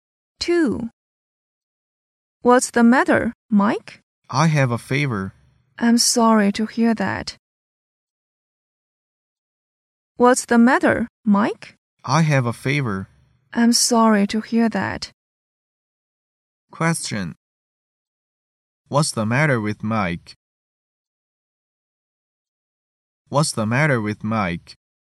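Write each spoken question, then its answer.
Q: What's the matter with Mike?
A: He has a fever.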